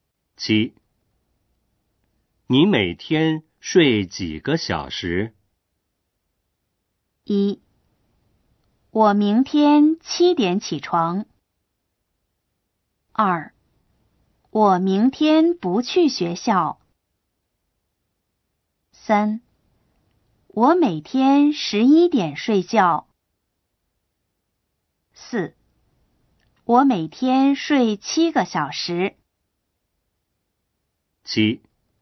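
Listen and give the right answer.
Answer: 4: 我每天睡七个小时。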